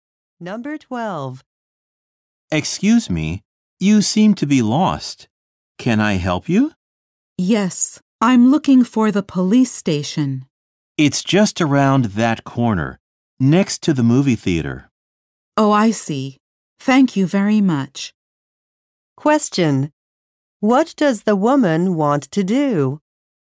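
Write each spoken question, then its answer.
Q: What does the woman want to do?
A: Find the police station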